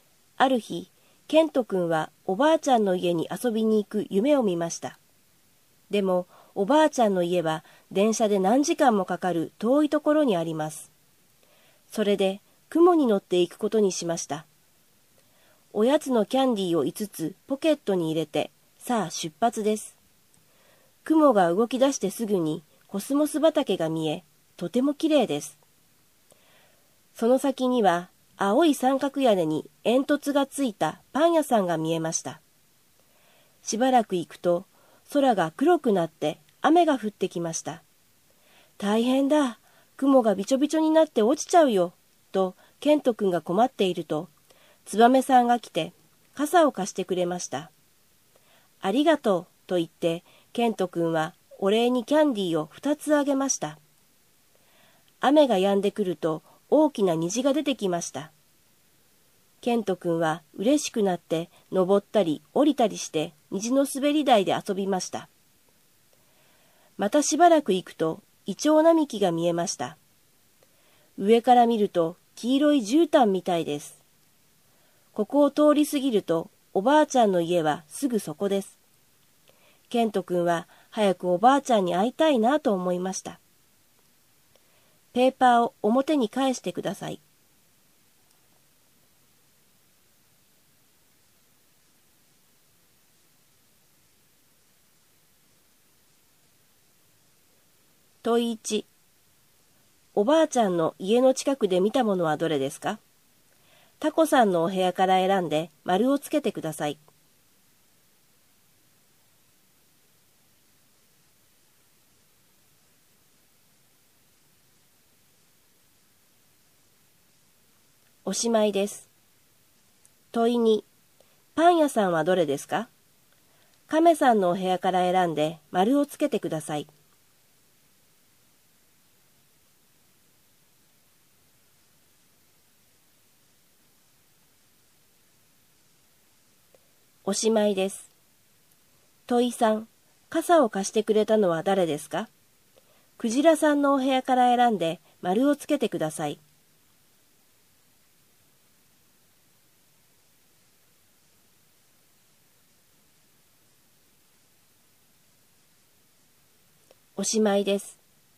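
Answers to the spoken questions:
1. イチョウ並木
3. ツバメさん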